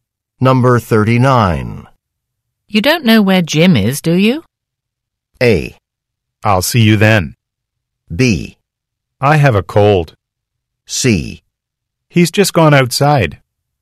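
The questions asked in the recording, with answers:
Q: You don't know where Jim is, do you?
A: C: He's just gone outside.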